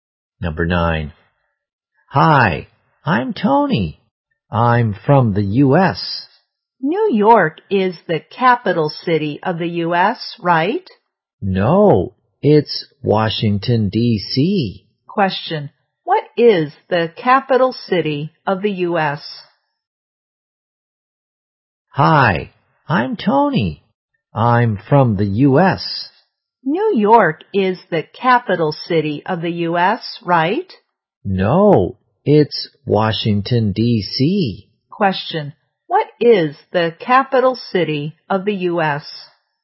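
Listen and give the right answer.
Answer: Washington, D.C.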